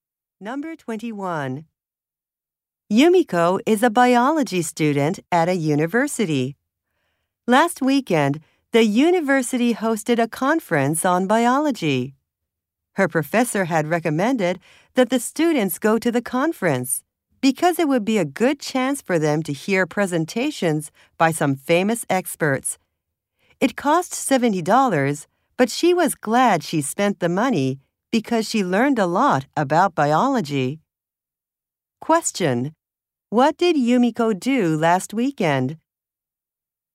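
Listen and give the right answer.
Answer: She went to a biology conference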